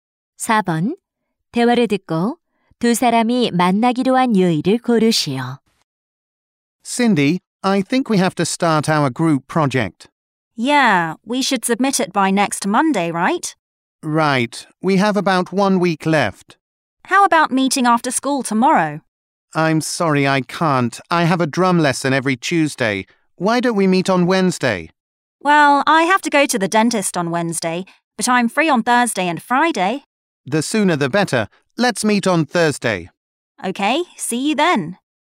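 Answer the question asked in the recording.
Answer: 목요일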